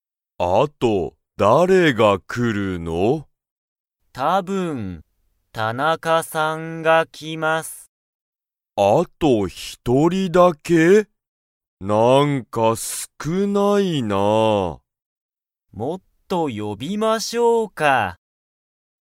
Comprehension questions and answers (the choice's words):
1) あと、たぶん____が来(く)る。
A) 山田(やまだ)さん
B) 田中(たなか)さん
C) 上田(うえだ)さん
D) 中野(なかの)さん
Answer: 田中(たなか)さん

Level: Level 1